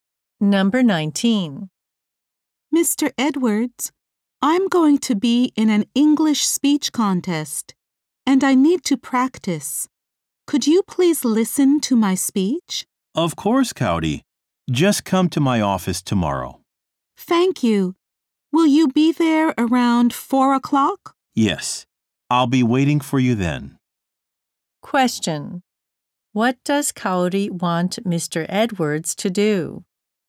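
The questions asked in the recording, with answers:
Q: What does Cowdy want Mr. Edwards to do?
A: Listen to her speech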